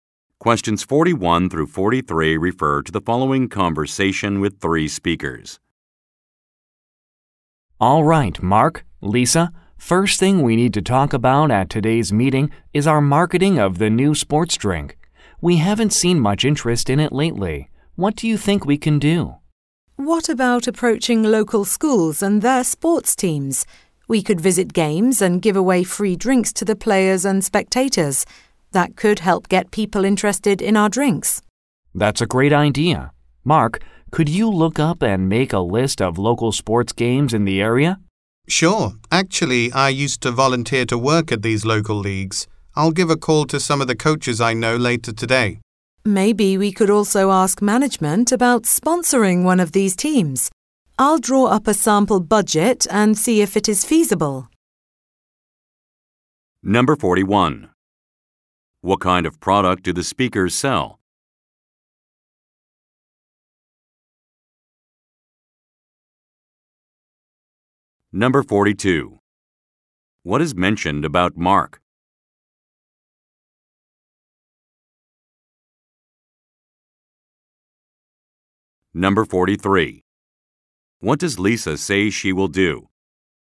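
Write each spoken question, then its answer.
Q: What kind of product do the speakers sell?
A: Sports drinks

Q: What is mentioned about Mark?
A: He used to volunteer at local sports leagues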